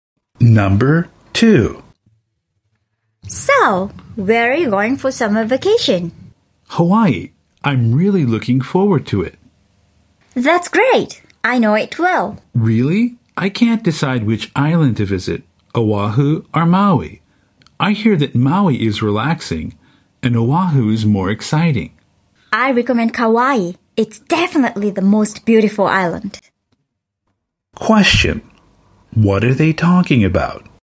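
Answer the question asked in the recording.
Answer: Which Hawaiian island to visit on summer vacation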